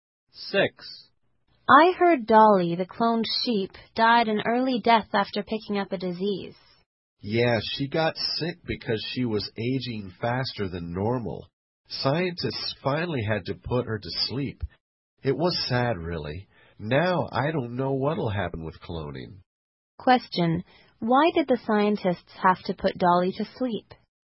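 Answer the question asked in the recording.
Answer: She got sick because she was aging faster than normal.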